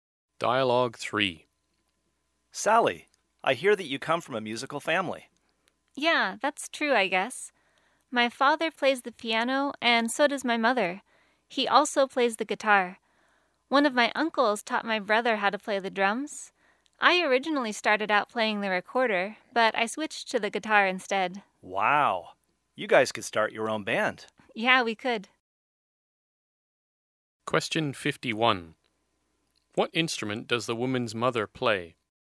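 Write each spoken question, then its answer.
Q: What instrument does the woman's mother play?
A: The piano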